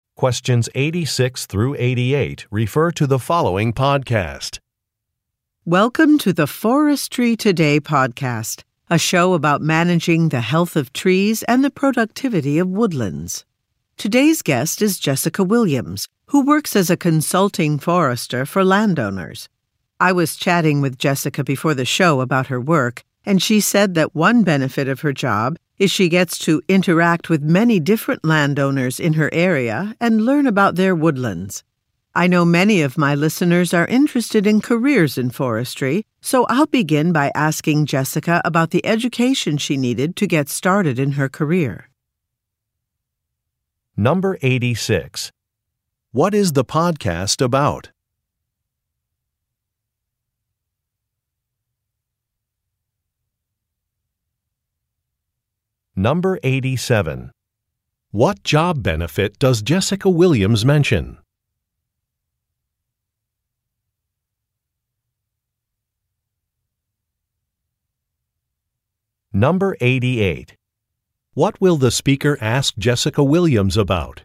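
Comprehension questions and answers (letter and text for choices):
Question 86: What is the podcast about?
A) Real estate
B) Forestry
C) Sports management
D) Solar energy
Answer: B) Forestry

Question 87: What job benefit does Jessica Williams mention?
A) Meeting new people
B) Having flexible hours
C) Being outdoors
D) Working remotely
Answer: A) Meeting new people

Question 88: What will the speaker ask Jessica Williams about?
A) Her teaching experience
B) Her publications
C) Her travels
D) Her education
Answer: D) Her education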